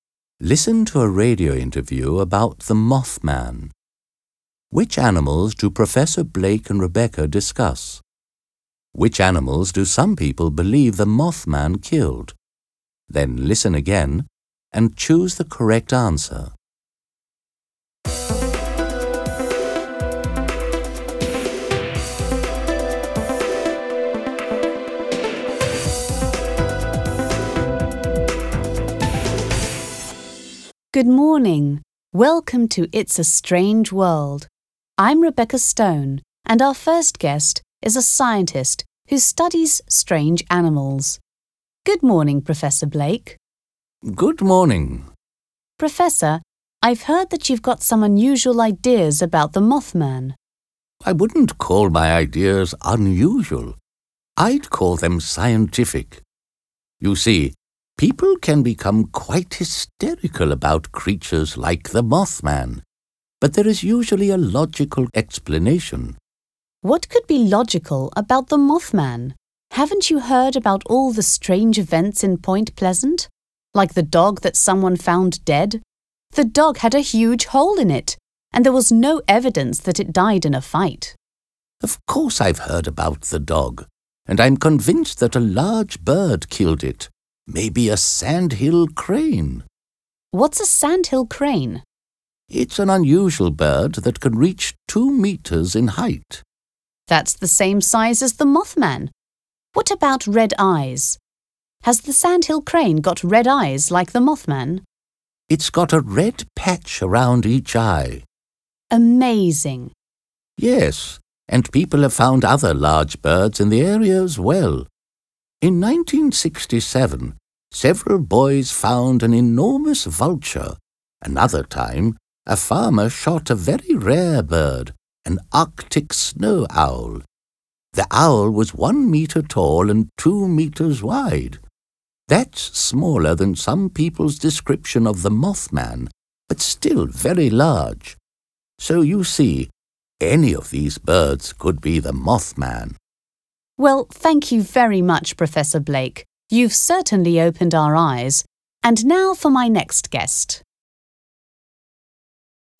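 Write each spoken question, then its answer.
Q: Which animals do Professor Blake and Rebecca discuss?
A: Large birds: a sandhill crane, a vulture and an Arctic snow owl (and a dog)

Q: Which animals do some people believe the Mothman killed?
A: A dog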